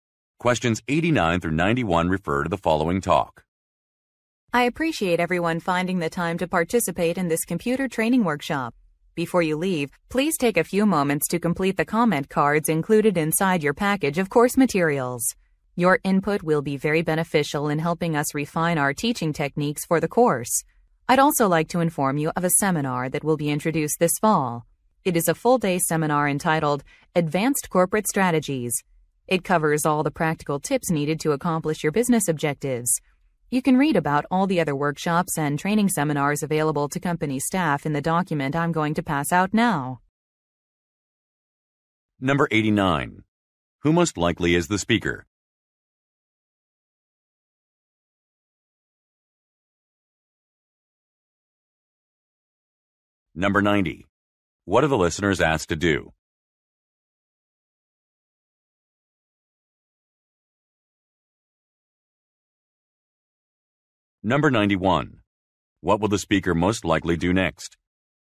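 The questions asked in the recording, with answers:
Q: Who most likely is the speaker?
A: A computer workshop trainer

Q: What are the listeners asked to do?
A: Complete comment cards

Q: What will the speaker most likely do next?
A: Hand out a document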